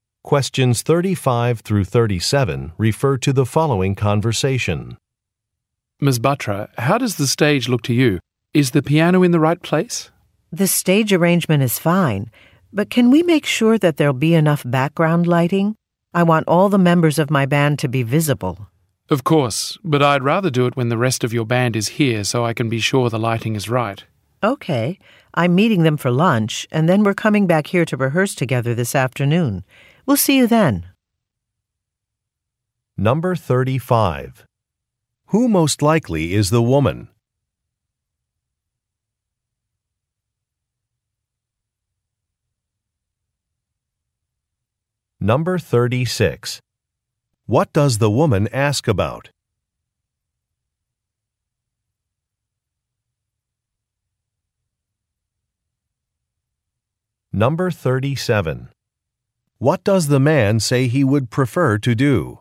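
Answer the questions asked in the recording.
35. A musician (a band leader)
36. The background lighting
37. Set the lighting when the rest of the band is there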